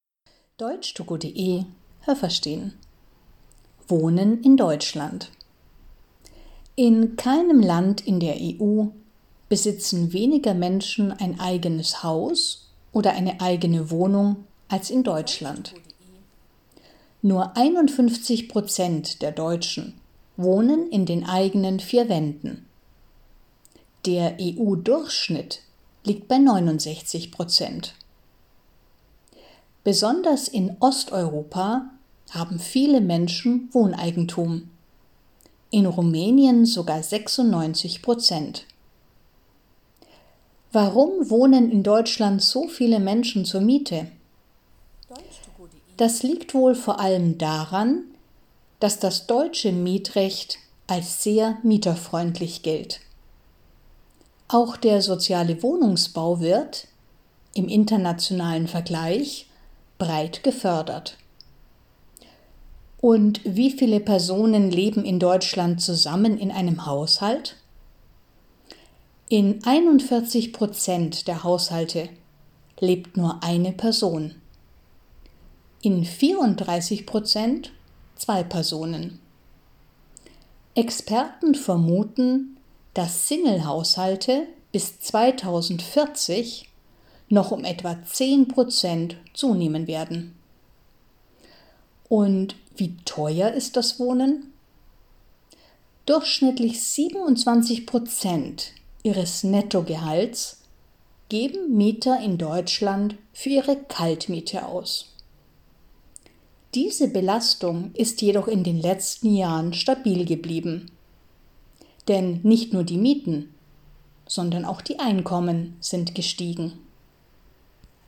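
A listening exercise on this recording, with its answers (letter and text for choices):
Was haben Sie gehört? Es gibt nur eine korrekte Antwort.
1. Deutschland ist das Land in der EU, in dem _____ eine eigene Wohnung haben.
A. die wenigsten Menschen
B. die meisten Menschen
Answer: A. die wenigsten Menschen

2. _____ Prozent in der gesamten EU haben ein eigenes Haus oder eine eigene Wohnung.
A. 69 Prozent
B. 96 Prozent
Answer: A. 69 Prozent

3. Viele Menschen in Deutschland leben in Miete, ...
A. weil das deutsche Mietrecht sehr mieterfreundlich ist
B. weil der soziale Wohnungsbau nicht gefördert wird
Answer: A. weil das deutsche Mietrecht sehr mieterfreundlich ist

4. _____ der Deutschen leben in Single-Haushalten.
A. 34 Prozent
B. 41 Prozent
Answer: B. 41 Prozent

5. Bis 2040 wird es in Deutschland _____ Single-Haushalte geben.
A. weniger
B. mehr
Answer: B. mehr

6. Mieter in Deutschland zahlen für ihre Miete _____ des Nettogehalts.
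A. 17 Prozent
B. 27 Prozent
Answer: B. 27 Prozent

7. In den letzten Jahren sind die Mieten gestiegen, ...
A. aber die Einkommen sind nicht gestiegen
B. aber auch die Einkommen sind gestiegen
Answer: B. aber auch die Einkommen sind gestiegen

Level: B1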